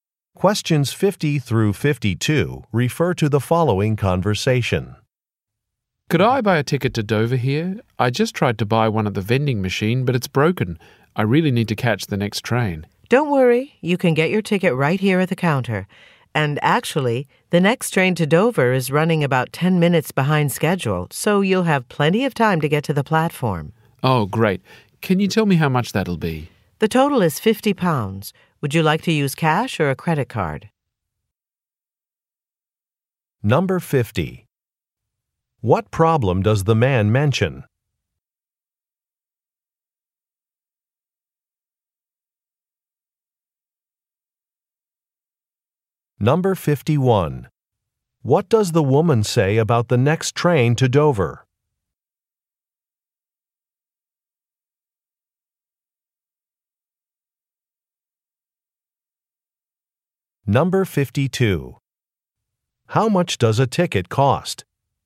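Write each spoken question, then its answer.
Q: What problem does the man mention?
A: The ticket machine is broken

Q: What does the woman say about the next train to Dover?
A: It is running about 10 minutes late

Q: How much does a ticket cost?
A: £50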